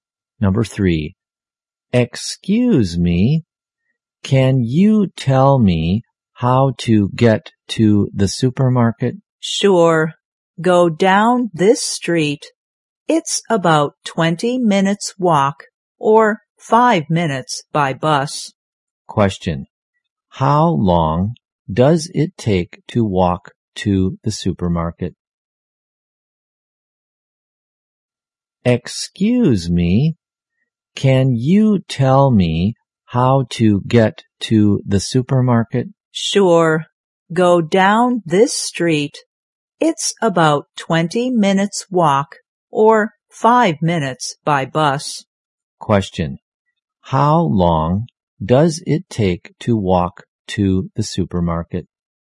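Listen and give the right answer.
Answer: About 20 minutes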